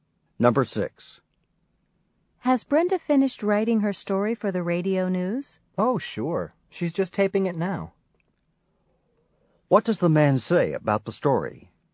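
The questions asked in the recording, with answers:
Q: What does the man say about the story?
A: Brenda finished it and is taping it now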